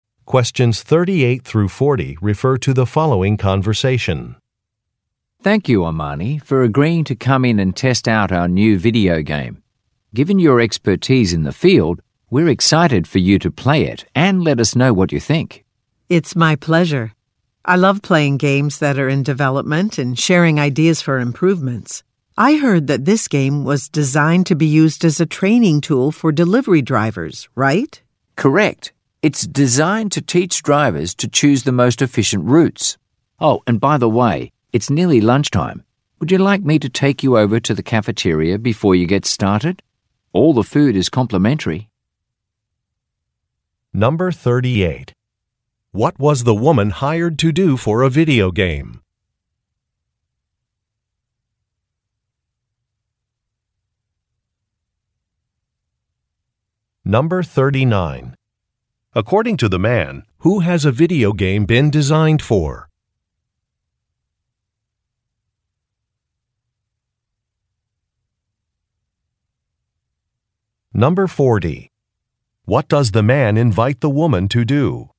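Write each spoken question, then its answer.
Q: What was the woman hired to do for a video game?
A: Test it and give feedback

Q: According to the man, who has a video game been designed for?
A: Delivery drivers

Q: What does the man invite the woman to do?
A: Go to the cafeteria for lunch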